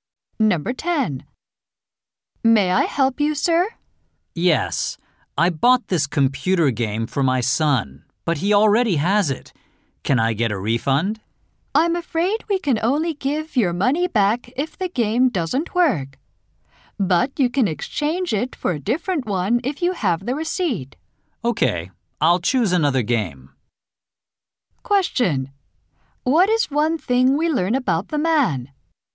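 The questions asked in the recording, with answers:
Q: What is one thing we learn about the man?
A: He bought a game his son already has and will exchange it.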